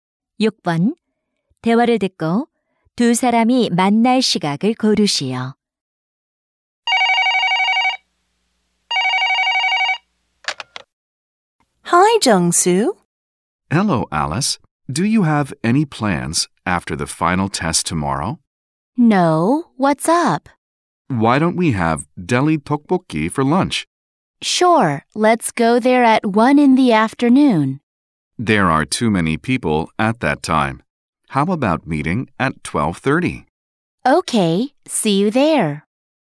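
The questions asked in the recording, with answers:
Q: 대화를 듣고 두 사람이 만날 시각을 고르시오.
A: 12시 30분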